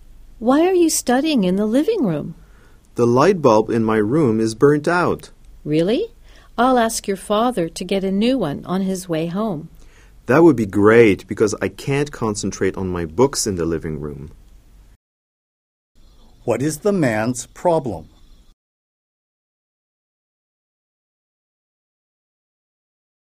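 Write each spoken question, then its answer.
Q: What is the man's problem?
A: The light bulb in his room is burnt out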